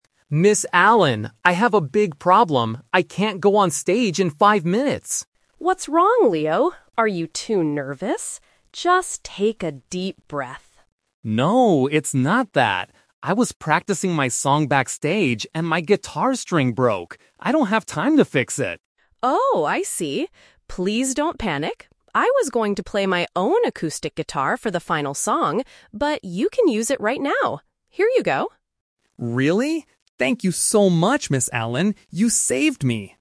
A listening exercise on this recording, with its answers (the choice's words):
Listen to the conversation between a student and a music teacher. Choose the correct answer (A, B, or C) for each question.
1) Why does the boy say he cannot go on stage?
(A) Because he is too nervous.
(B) Because his guitar string is broken.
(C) Because he forgot his music notes.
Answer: Because his guitar string is broken.

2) What was the boy doing when the problem happened?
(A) He was fixing his guitar.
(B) He was performing on the stage.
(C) He was practicing his song backstage.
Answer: He was practicing his song backstage.

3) How does the teacher solve the problem?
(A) She gives the boy her own guitar.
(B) She fixes the broken string for him.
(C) She tells him to sing without playing.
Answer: She gives the boy her own guitar.

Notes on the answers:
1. The boy explains the real problem: "...my guitar string broke!" Option (A) is the A2 Trap; the teacher asks "Are you too nervous?", but the boy says, "No, it's not that." Option (C) is a plausible problem before a show, but it is never mentioned in the audio.
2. The boy states clearly what he was doing: "I was practicing my song backstage..." Option (A) is a trap because the word "fix" is mentioned, but he says he doesn't have time to fix it. Option (B) is a trap because he hasn't gone on the stage yet (he is supposed to go in five minutes).
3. The teacher offers her own instrument: "...you can use it right now. Here you go." Option (B) is a trap because, as the boy mentioned, there is no time to fix the string. Option (C) is a logical solution in real life but is not mentioned in the conversation.

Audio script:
Boy: Ms. Allen! I have a big problem. I can't go on stage in five minutes!
Woman: What's wrong, Leo? Are you too nervous? Just take a deep breath.
Boy: No, it's not that. I was practicing my song backstage, and my guitar string broke! I don't have time to fix it.
Woman: Oh, I see. Please don't panic. I was going to play my own acoustic guitar for the final song, but you can use it right now. Here you go.